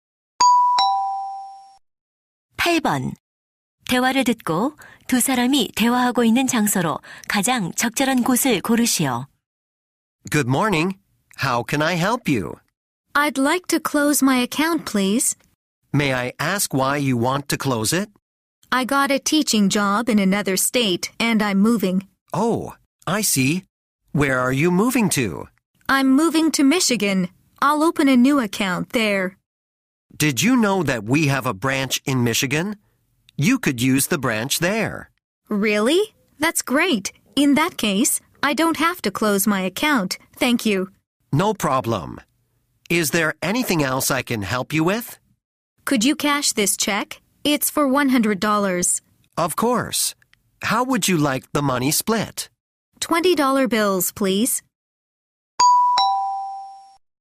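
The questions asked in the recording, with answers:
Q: 대화를 듣고 두 사람이 대화하고 있는 장소로 가장 적절한 곳을 고르시오.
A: 은행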